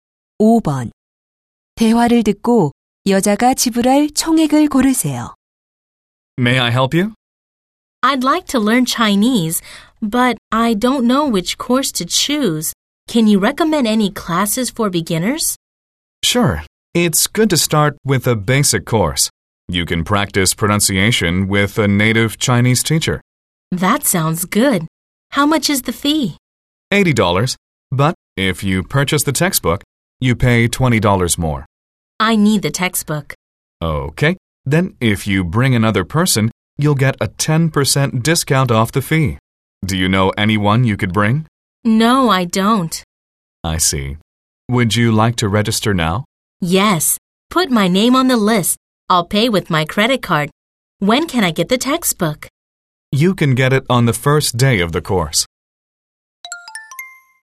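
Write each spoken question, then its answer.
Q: 대화를 듣고 여자가 지불할 총액을 고르세요.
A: $100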